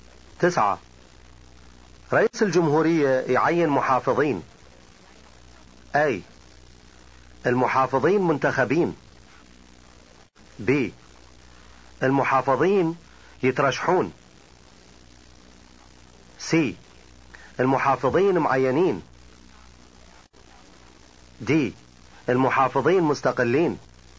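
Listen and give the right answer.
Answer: C: المحافظين معينين.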